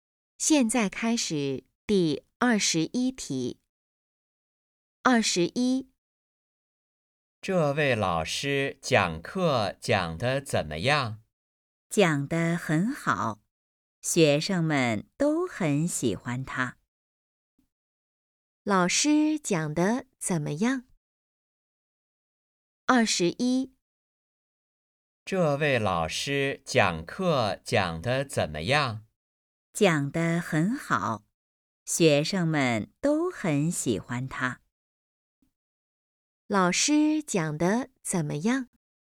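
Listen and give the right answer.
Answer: 讲得很好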